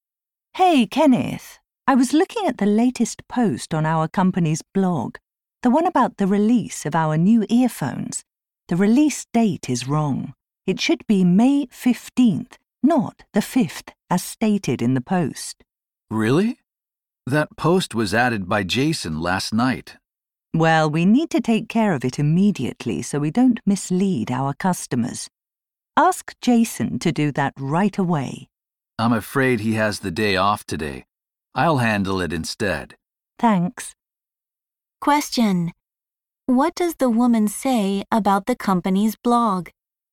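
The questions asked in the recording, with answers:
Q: What does the woman say about the company's blog?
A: A post has the wrong release date for the new earphones.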